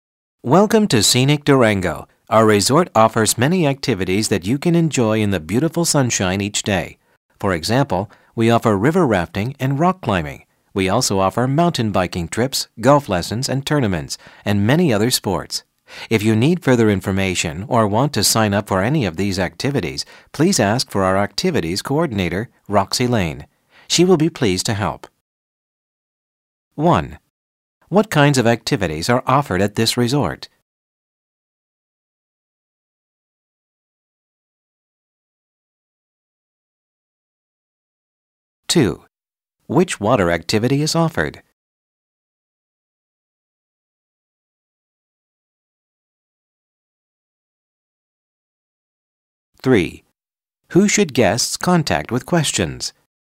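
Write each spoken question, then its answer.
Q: What kinds of activities are offered at this resort?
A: Outdoor sports activities

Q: Which water activity is offered?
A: River rafting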